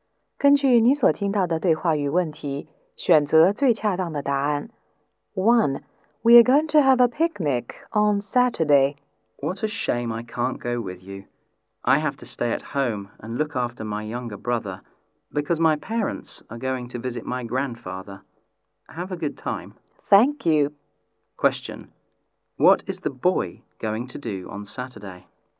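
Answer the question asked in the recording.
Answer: Stay at home and look after his younger brother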